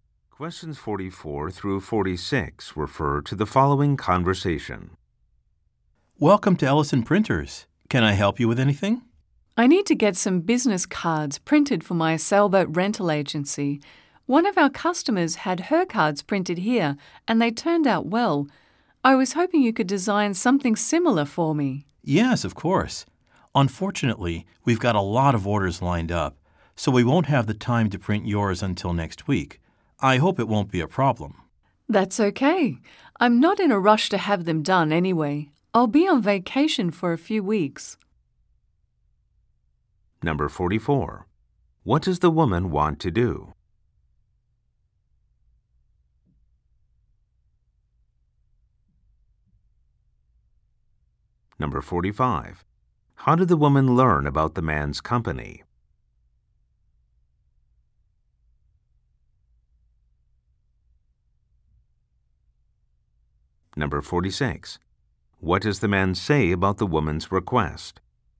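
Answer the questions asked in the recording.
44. Get business cards printed
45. From one of her customers
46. It can't be printed until next week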